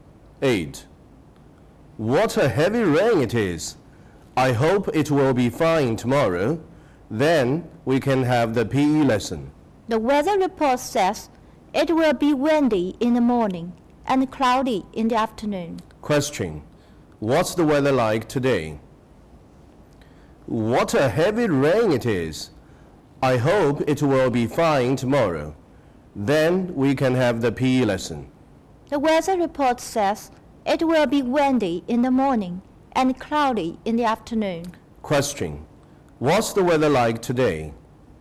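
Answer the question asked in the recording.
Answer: It's raining heavily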